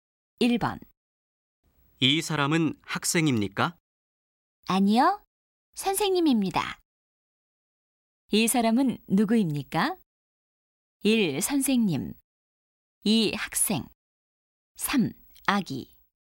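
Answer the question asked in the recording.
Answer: 1: 선생님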